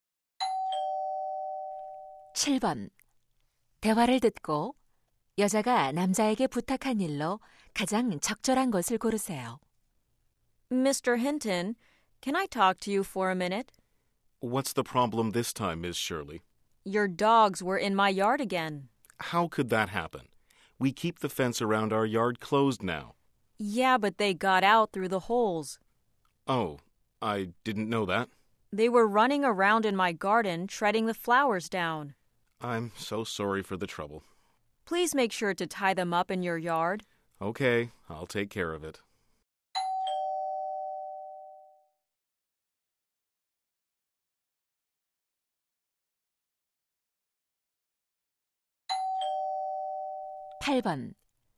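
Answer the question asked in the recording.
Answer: 개를 마당에 묶어 두기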